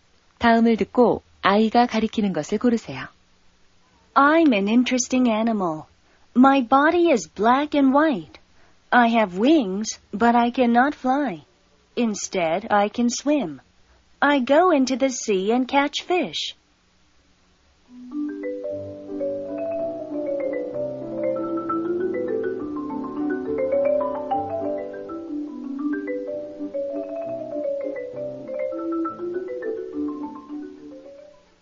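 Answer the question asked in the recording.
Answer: 펭귄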